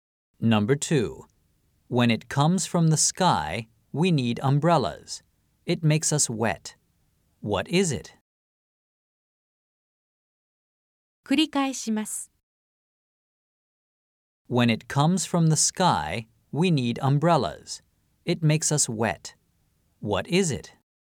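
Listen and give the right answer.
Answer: rain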